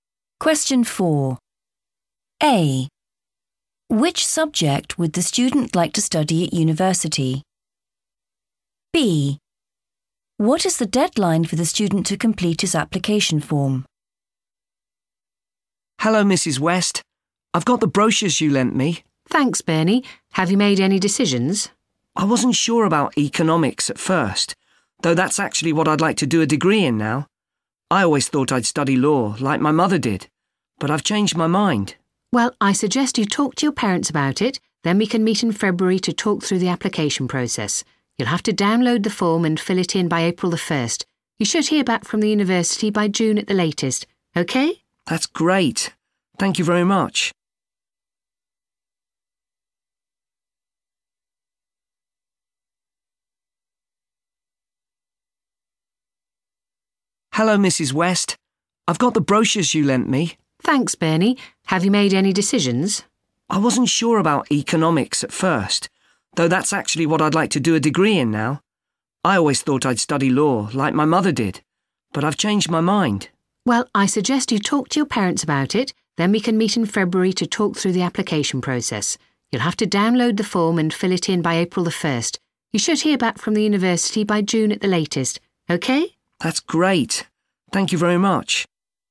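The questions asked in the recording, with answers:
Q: Which subject would the student like to study at university?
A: economics

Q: What is the deadline for the student to complete his application form?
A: April the 1st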